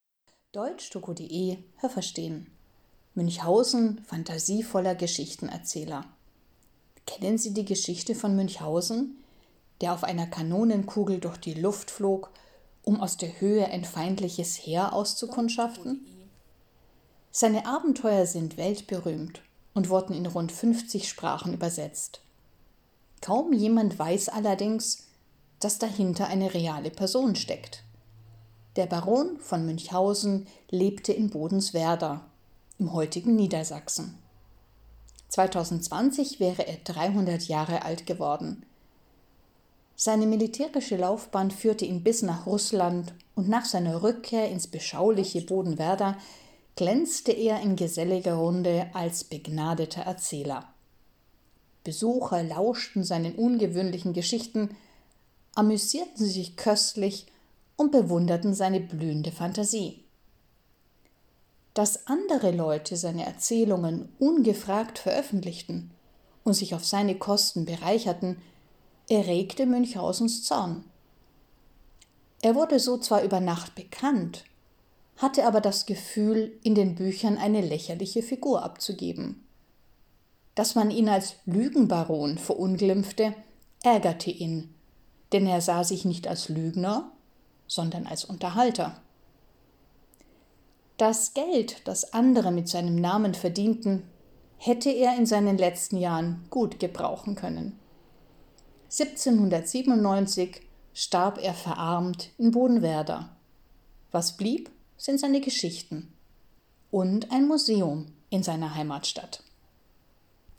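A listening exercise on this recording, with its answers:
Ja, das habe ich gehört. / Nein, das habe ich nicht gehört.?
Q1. In einer bekannten Geschichte flog Münchhausen auf einer Kanonenkugel über das feindliche Lager, um zu spionieren.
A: Ja, das habe ich gehört.

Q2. Hinter den Geschichten Münchhausens, die in 50 Sprachen übersetzt wurden, steckt eine Kunstfigur, die vor 300 Jahren erschaffen wurde.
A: Nein, das habe ich nicht gehört.

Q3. Münchhausen war ein deutscher Adeliger, der im Laufe seiner militärischen Karriere auch nach Russland kam.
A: Ja, das habe ich gehört.

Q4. Nach seinem Russlandaufenthalt kehrte der Baron in seine Heimat zurück und faszinierte dort seine Gäste mit fantasievollen und ungewöhnlichen Geschichten.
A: Ja, das habe ich gehört.

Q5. Der Baron hat seine Geschichten mit Hilfe anderer Leute veröffentlicht und wurde deshalb schnell berühmt.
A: Nein, das habe ich nicht gehört.

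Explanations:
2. Hinter den Geschichten steckte der echte Baron von Münchhausen, der im Jahr 2020 seinen 300. Geburtstag gefeiert hätte.

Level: C2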